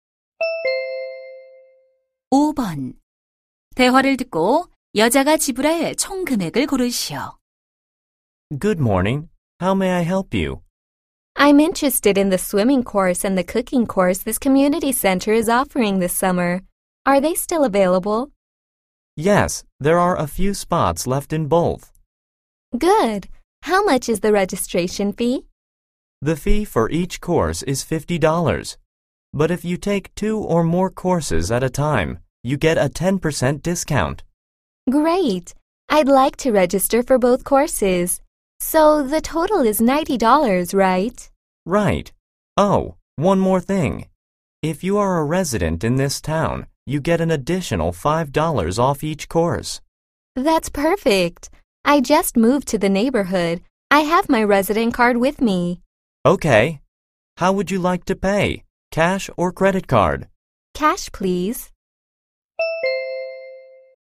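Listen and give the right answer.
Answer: 80달러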